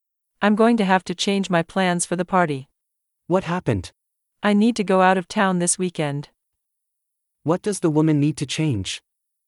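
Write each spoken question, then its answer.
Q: What does the woman need to change?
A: her plans for the party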